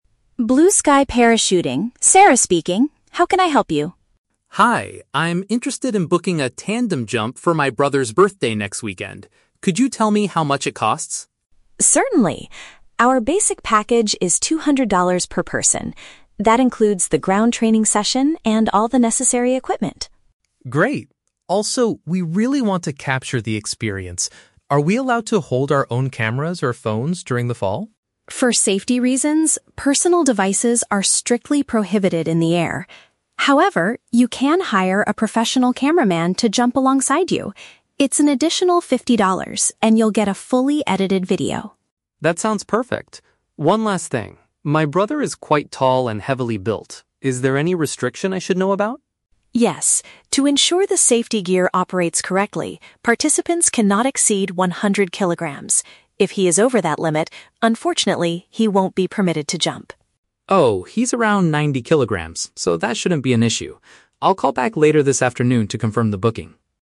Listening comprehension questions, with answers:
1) How can the customer get a video of the skydiving experience?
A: By paying extra money for an expert to film the jump.

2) Why does the center have a strict weight limit for participants?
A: To guarantee that the parachuting gear works properly.

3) What do we learn about the customer's brother?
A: His body weight is acceptable under the company's safety rules.

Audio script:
Sarah: Blue Sky Parachuting, Sarah speaking. How can I help you?
Tom: Hi, I'm interested in booking a tandem jump for my brother's birthday next weekend. Could you tell me how much it costs?
Sarah: Certainly. Our basic package is two hundred dollars per person. That includes the ground training session and all the necessary equipment.
Tom: Great. Also, we really want to capture the experience. Are we allowed to hold our own cameras or phones during the fall?
Sarah: For safety reasons, personal devices are strictly prohibited in the air. However, you can hire a professional cameraman to jump alongside you. It's an additional fifty dollars, and you'll get a fully edited video.
Tom: That sounds perfect. One last thing, my brother is quite tall and heavily built. Is there any restriction I should know about?
Sarah: Yes. To ensure the safety gear operates correctly, participants cannot exceed one hundred kilograms. If he is over that limit, unfortunately, he won't be permitted to jump.
Tom: Oh, he's around ninety kilograms, so that shouldn't be an issue. I'll call back later this afternoon to confirm the booking.